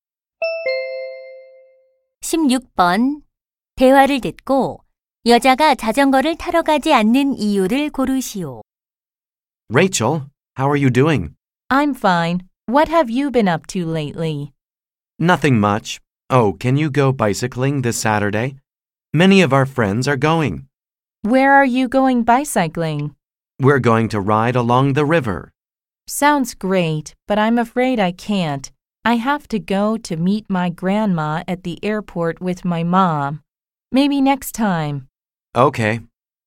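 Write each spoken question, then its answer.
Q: 대화를 듣고 여자가 자전거를 타러 가지 않는 이유를 고르시오.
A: 엄마와 공항에 할머니를 마중 나가야 해서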